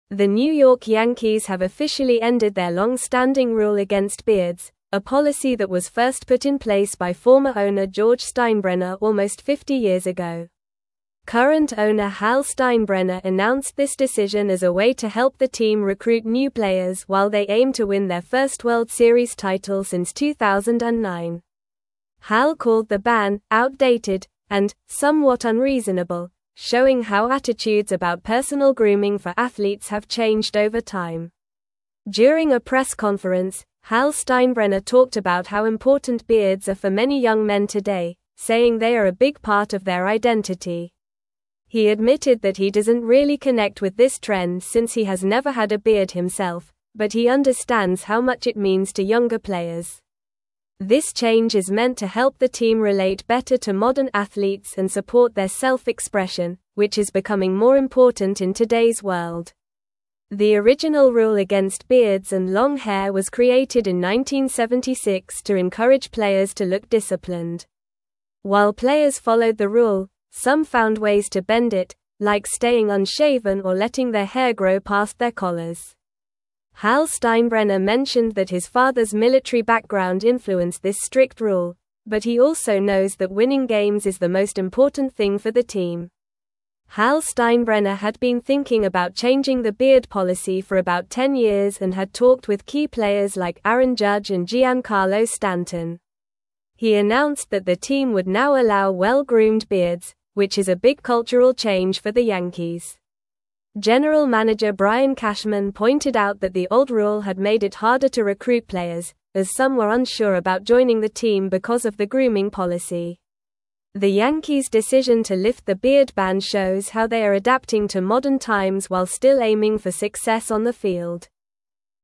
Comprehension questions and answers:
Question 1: The New York Yankees have officially ended their long-standing rule against beards, a (1)______ that was first put in (2)______ by former (3)______ (4)______ Steinbrenner almost 50 years ago.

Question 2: The New York Yankees have officially ended their long-standing rule against beards, a (1)______ that was first put in (2)______ by former (3)______ (4)______ Steinbrenner almost 50 years ago.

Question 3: The New York Yankees have officially ended their long-standing rule against beards, a (1)______ that was first put in (2)______ by former (3)______ (4)______ Steinbrenner almost 50 years ago.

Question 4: The New York Yankees have officially ended their long-standing rule against beards, a (1)______ that was first put in (2)______ by former (3)______ (4)______ Steinbrenner almost 50 years ago.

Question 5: During a press conference, Hal Steinbrenner talked about how important beards are for many young men today, saying they are a big part of their (5)______.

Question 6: This (6)______ is (7)______ to help the team relate better to (8)______ athletes and support their self-expression, which is becoming more important in today's world.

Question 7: This (6)______ is (7)______ to help the team relate better to (8)______ athletes and support their self-expression, which is becoming more important in today's world.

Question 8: This (6)______ is (7)______ to help the team relate better to (8)______ athletes and support their self-expression, which is becoming more important in today's world.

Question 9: The original rule against beards and long hair was created in 1976 to encourage (9)______ to look disciplined.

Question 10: While players followed the rule, some found ways to bend it, like staying (10)______ or letting their hair grow past their collars.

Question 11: Hal Steinbrenner mentioned that his father's military (11)______ influenced this strict rule, but he also knows that winning games is the most important thing for the team.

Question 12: Hal Steinbrenner had been thinking about changing the beard policy for about ten (12)______ and had (13)______ with key players like Aaron Judge and Giancarlo Stanton.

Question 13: Hal Steinbrenner had been thinking about changing the beard policy for about ten (12)______ and had (13)______ with key players like Aaron Judge and Giancarlo Stanton.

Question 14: He announced that the team would now allow well-groomed (14)______, which is a big cultural change for the (15)______.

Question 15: He announced that the team would now allow well-groomed (14)______, which is a big cultural change for the (15)______.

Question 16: The Yankees' decision to lift the beard ban shows how they are adapting to modern (16)______ while still aiming for success on the field.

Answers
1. policy
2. place
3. owner
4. George
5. identity
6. change
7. meant
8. modern
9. players
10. unshaven
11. background
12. years
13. talked
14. beards
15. Yankees
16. times

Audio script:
The New York Yankees have officially ended their long-standing rule against beards, a policy that was first put in place by former owner George Steinbrenner almost 50 years ago. Current owner Hal Steinbrenner announced this decision as a way to help the team recruit new players while they aim to win their first World Series title since 2009. Hal called the ban "outdated" and "somewhat unreasonable," showing how attitudes about personal grooming for athletes have changed over time.
During a press conference, Hal Steinbrenner talked about how important beards are for many young men today, saying they are a big part of their identity. He admitted that he doesn't really connect with this trend since he has never had a beard himself, but he understands how much it means to younger players. This change is meant to help the team relate better to modern athletes and support their self-expression, which is becoming more important in today's world.
The original rule against beards and long hair was created in 1976 to encourage players to look disciplined. While players followed the rule, some found ways to bend it, like staying unshaven or letting their hair grow past their collars. Hal Steinbrenner mentioned that his father's military background influenced this strict rule, but he also knows that winning games is the most important thing for the team.
Hal Steinbrenner had been thinking about changing the beard policy for about ten years and had talked with key players like Aaron Judge and Giancarlo Stanton. He announced that the team would now allow well-groomed beards, which is a big cultural change for the Yankees. General manager Brian Cashman pointed out that the old rule had made it harder to recruit players, as some were unsure about joining the team because of the grooming policy. The Yankees' decision to lift the beard ban shows how they are adapting to modern times while still aiming for success on the field.

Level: Level 3